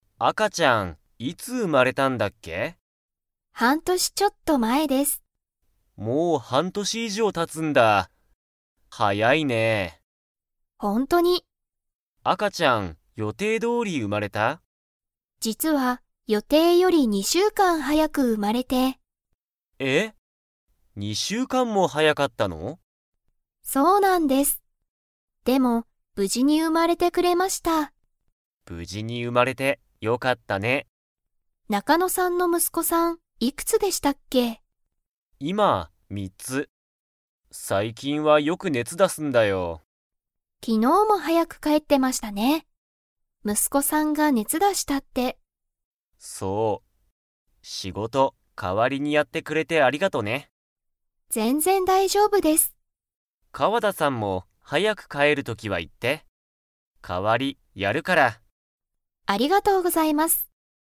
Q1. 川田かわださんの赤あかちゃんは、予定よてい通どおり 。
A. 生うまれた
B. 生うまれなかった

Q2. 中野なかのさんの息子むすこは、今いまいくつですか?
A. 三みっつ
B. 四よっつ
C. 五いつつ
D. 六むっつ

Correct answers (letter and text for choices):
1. B. 生うまれなかった
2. A. 三みっつ

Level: Level 4